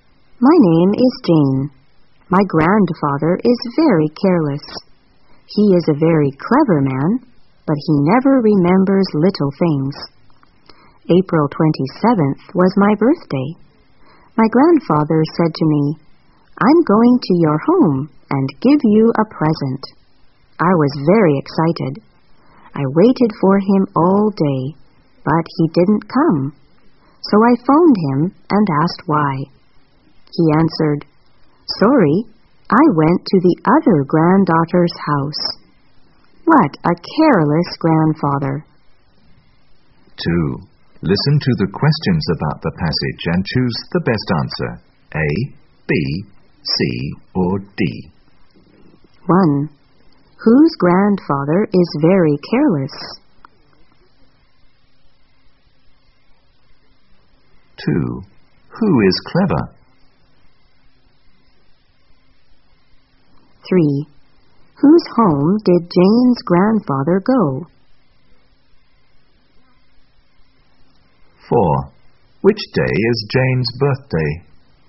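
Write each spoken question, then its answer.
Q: Whose grandfather is very careless?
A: Jane's

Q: Who is clever?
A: Jane's grandfather

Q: Whose home did Jane's grandfather go?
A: His other granddaughter's

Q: Which day is Jane's birthday?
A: April 27th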